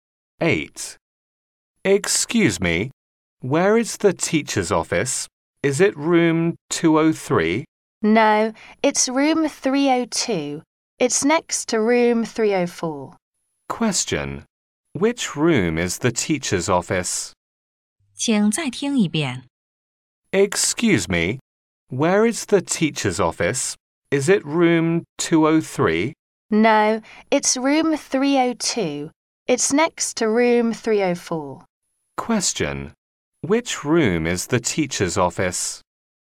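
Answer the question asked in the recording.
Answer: Room 302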